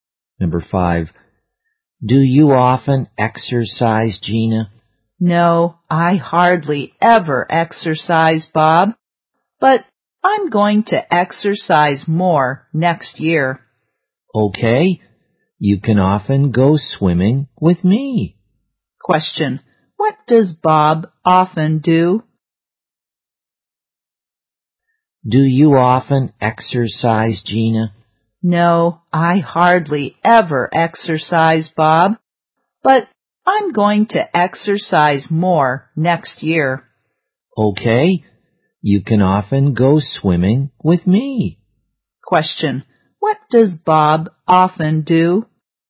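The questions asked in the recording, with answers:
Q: Question, what does Bob often do?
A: Goes swimming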